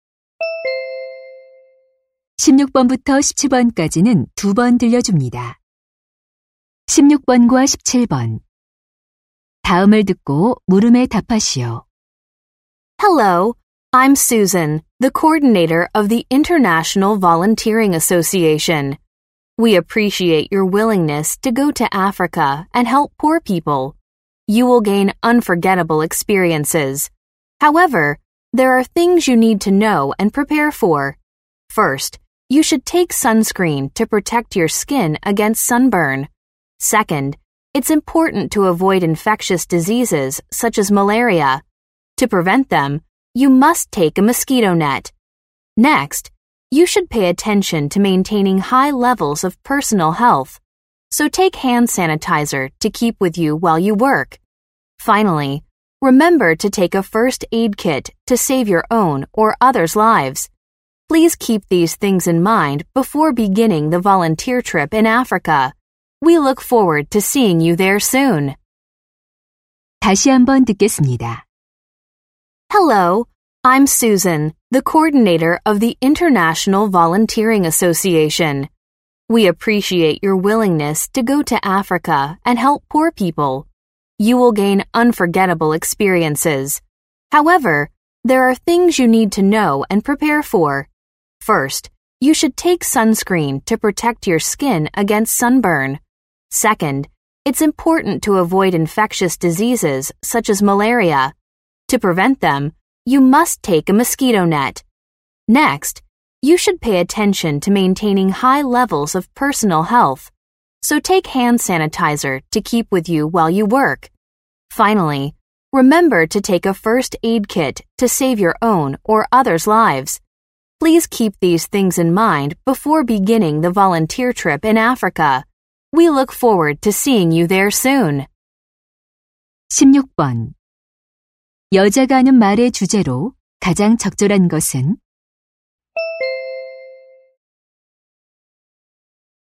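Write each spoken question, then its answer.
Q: 여자가 하는 말의 주제로 가장 적절한 것은?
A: 아프리카 봉사 활동을 위해 준비해야 할 것들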